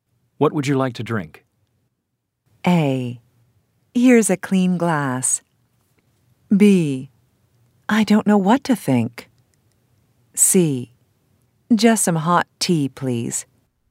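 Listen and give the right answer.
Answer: C: Just some hot tea, please.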